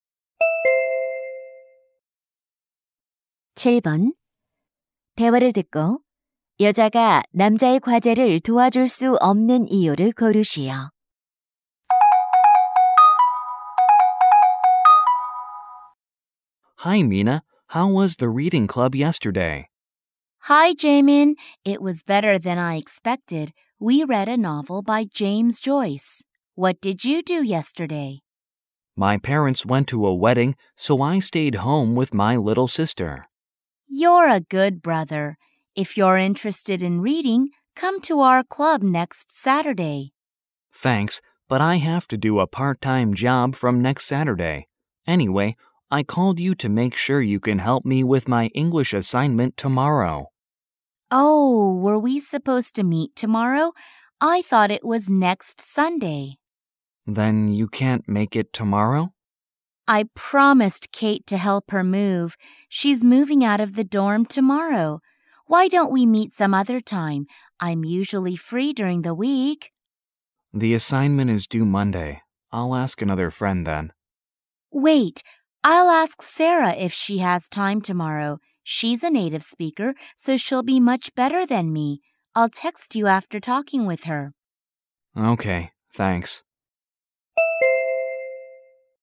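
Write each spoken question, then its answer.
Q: 대화를 듣고 여자가 남자의 과제를 도와줄 수 없는 이유를 고르시오.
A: Kate의 이사를 돕기로 약속해서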